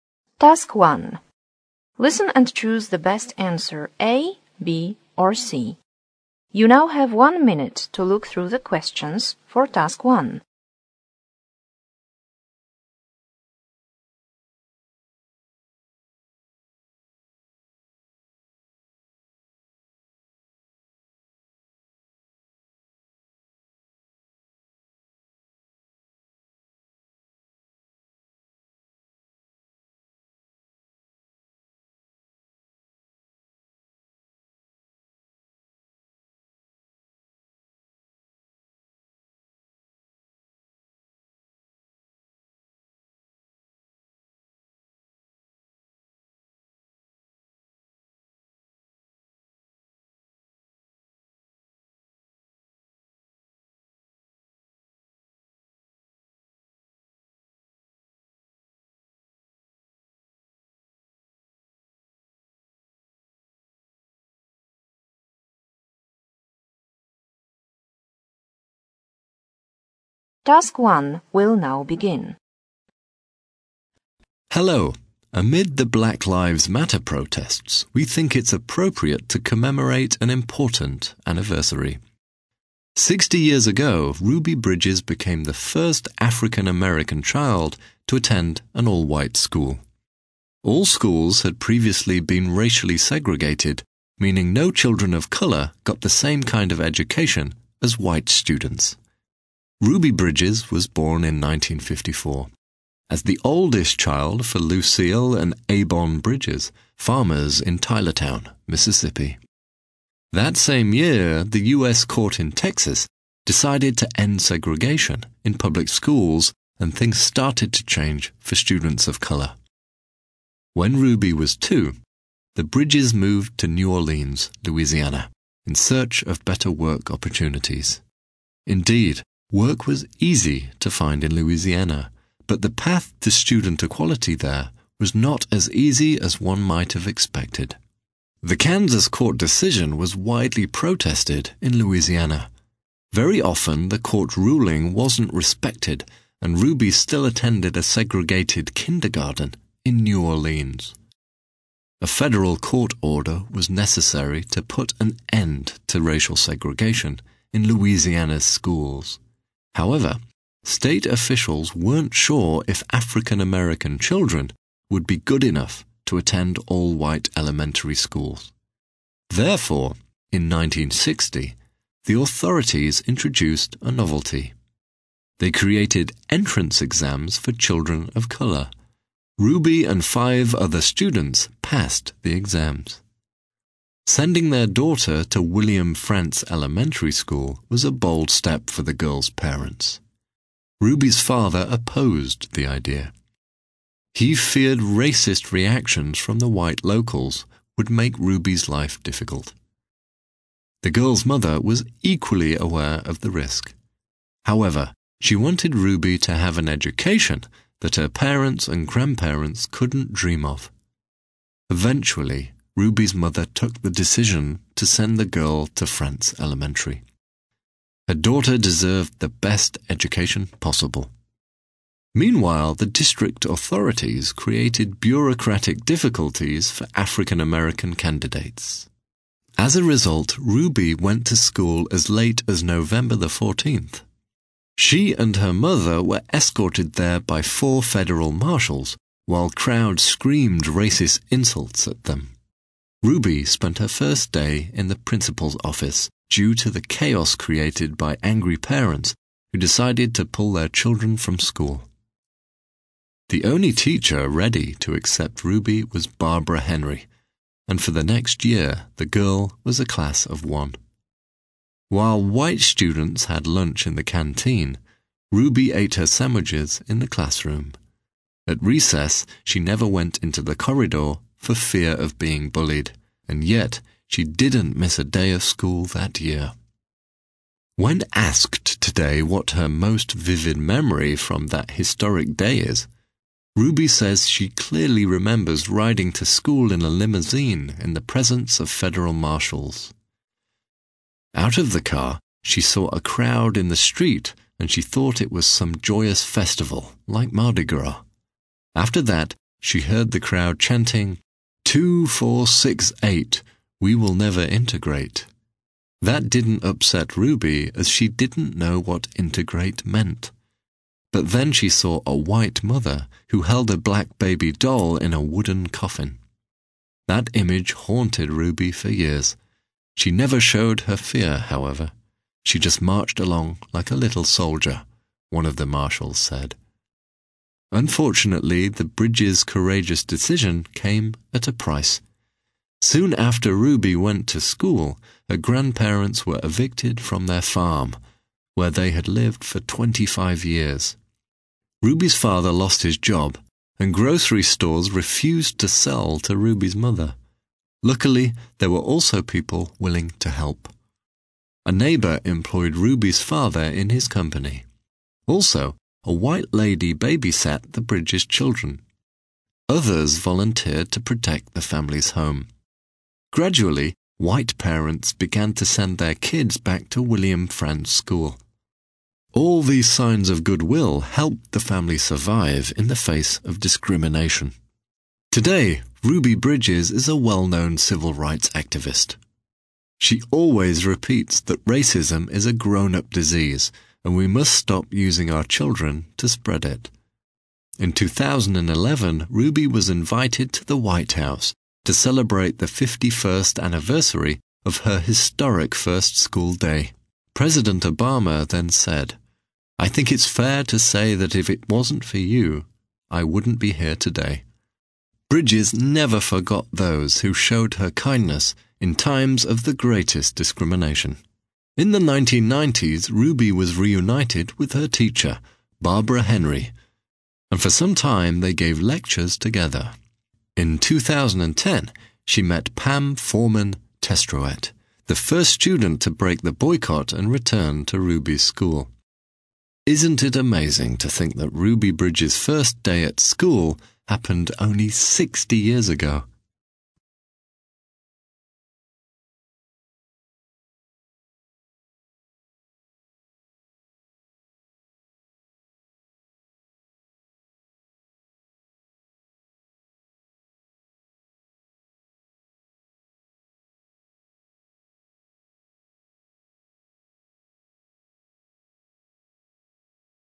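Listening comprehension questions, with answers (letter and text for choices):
Listen and choose the best answer a), b) or c).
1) Ruby Bridges' family moved to Louisiana because of ...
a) a court's decision to end racial segregation there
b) much better chances of finding employment there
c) a wider selection of prestigious schools there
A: b) much better chances of finding employment there

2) In 1960, Ruby ...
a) passed entrance exams to an all-white elementary school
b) took an entrance school exam together with white children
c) was accepted into an elementary school without exams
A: a) passed entrance exams to an all-white elementary school

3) The decision to send Ruby to W. Frantz Elementary School was made by ...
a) her mother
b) her grandparents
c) her father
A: a) her mother

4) Ruby spent her first day of school ...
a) in an empty classroom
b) in the school canteen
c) in the principal's office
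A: c) in the principal's office

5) The thing that scared Ruby most on her way to school was ...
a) the words shouted by the crowds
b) an object carried by the protesters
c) the presence of government officials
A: b) an object carried by the protesters

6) As a consequence of the Bridges' brave decision ...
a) Ruby's mother had trouble finding a babysitter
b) Ruby's parents were thrown out of their farm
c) Ruby's father was fired from his position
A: c) Ruby's father was fired from his position

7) In 2010, Ruby Bridges had an opportunity to ...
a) get together with her schoolmate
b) reunite with her former teacher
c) meet the president of the USA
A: a) get together with her schoolmate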